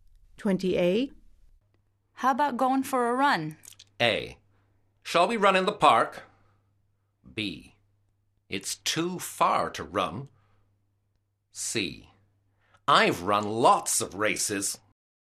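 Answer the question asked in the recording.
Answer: A: Shall we run in the park?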